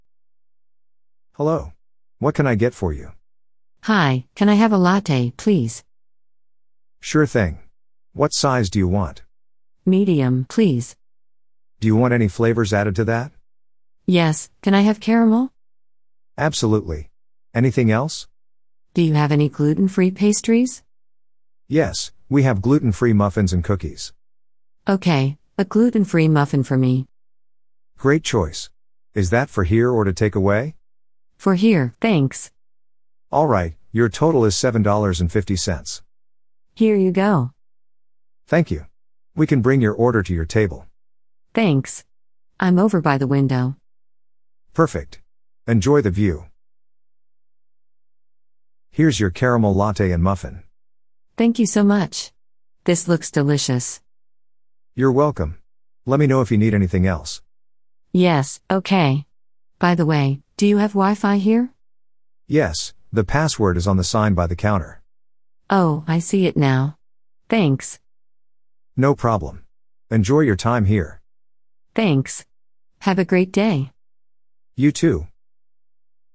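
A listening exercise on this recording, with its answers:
Listen to the mp3 file and put the events into the correct order. So, write '1' for the event you think is first. Then, listen again to check.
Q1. She sits by the window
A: 6

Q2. She pays for her order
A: 5

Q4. She asks about Wi-Fi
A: 8

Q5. She orders a latte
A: 2

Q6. She gets her coffee and muffin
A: 7

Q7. She asks for caramel flavour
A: 3

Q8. She orders a muffin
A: 4

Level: Beginner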